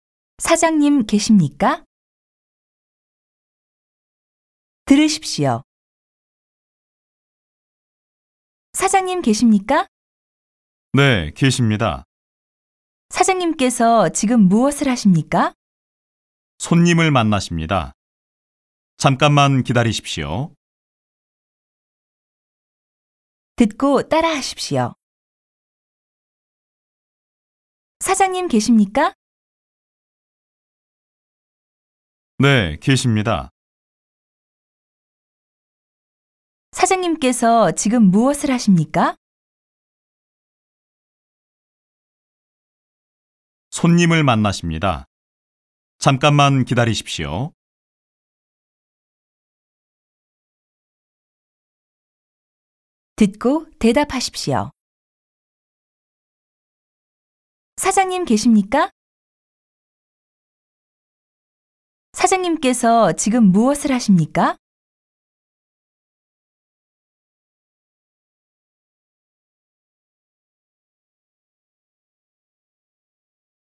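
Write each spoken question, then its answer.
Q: 사장님 계십니까?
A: 네, 계십니다.

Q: 사장님께서 지금 무엇을 하십니까?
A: 손님을 만나십니다.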